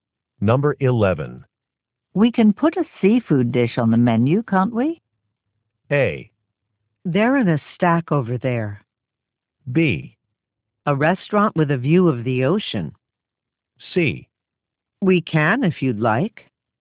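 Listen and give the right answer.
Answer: C: We can if you'd like.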